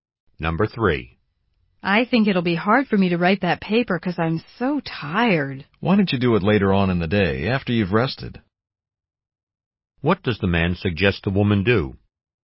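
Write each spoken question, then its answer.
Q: What does the man suggest the woman do?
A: Rest first and write the paper later in the day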